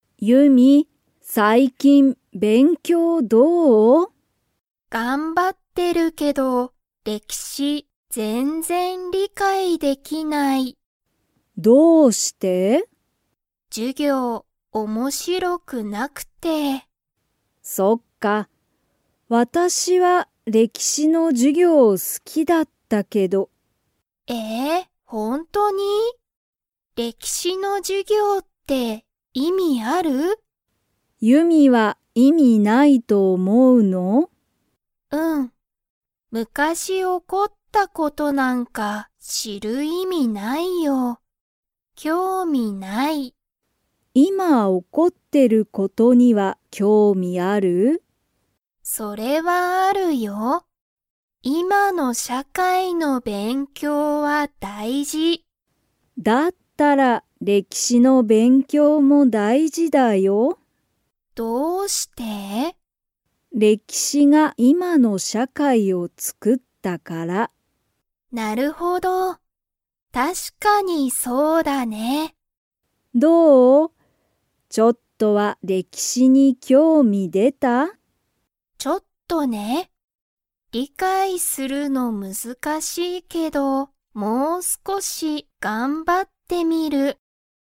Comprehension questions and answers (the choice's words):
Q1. ユミの母ははは、何なにが好すきでしたか?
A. 歴史れきしの授業じゅぎょう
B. 今いまの社会しゃかい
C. 料理りょうり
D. 興味きょうみ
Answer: 歴史れきしの授業じゅぎょう

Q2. ユミは、歴史れきしの勉強べんきょうを 。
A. 頑張がんばってみる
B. 頑張がんばってみない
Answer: 頑張がんばってみる

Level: Level 3